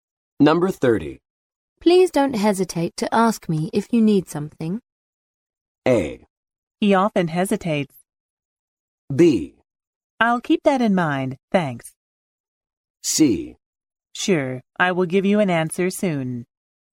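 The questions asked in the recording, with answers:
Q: Please don't hesitate to ask me if you need something.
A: B: I'll keep that in mind, thanks.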